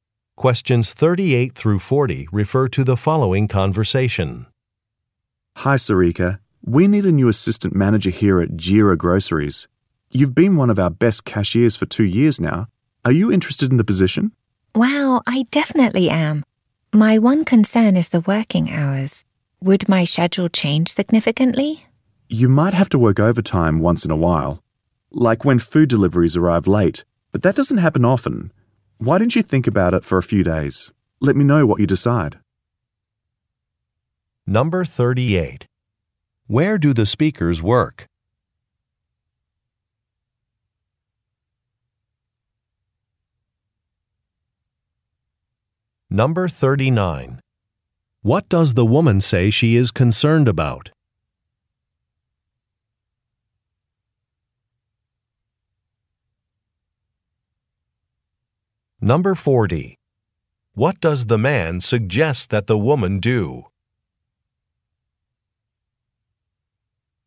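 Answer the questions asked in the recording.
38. At a grocery store
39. The working hours
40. Think about it for a few days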